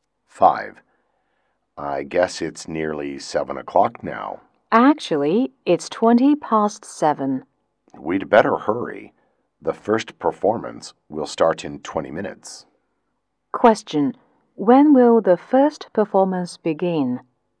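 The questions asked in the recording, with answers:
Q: when will the first performance begin?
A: At 7:40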